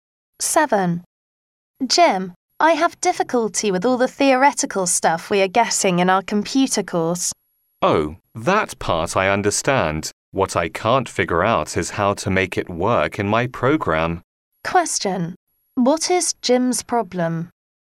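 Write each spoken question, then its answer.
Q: What is Jim's problem?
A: He can't apply the theory to his program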